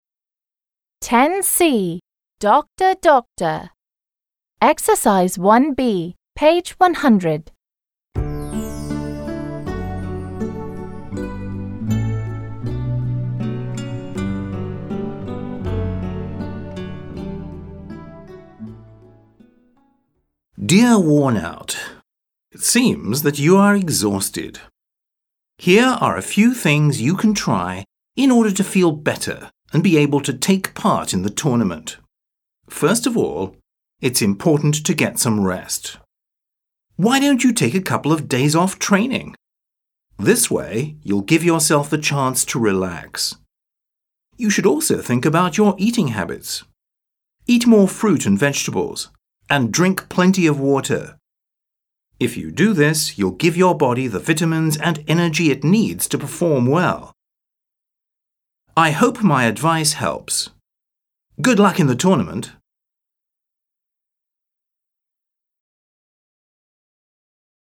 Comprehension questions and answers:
b. Read the letter. Which extract (A or B) does it match? Who is it to? Listen and check.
Which extract (A or B) does it match? Who is it to?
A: It matches the first extract (A). It is addressed to «Worn Out».

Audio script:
It seems that you are exhausted. Here are a few things you can try in order to feel better and be able to take part in the tournament.
First of all, it's important to get some rest. Why don't you take a couple of days off training? This way, you'll give yourself the chance to relax. You should also think about your eating habits. Eat more fruit and vegetables and drink plenty of water. If you do this, you'll give your body the vitamins and energy it needs to perform well.
3. I hope my advice helps. Good luck in the tournament!

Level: 7 класс